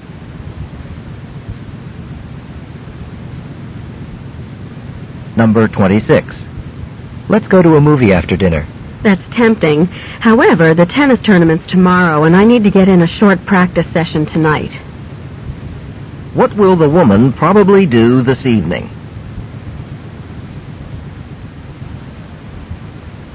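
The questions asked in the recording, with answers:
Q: What will the woman probably do this evening?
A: Practice tennis.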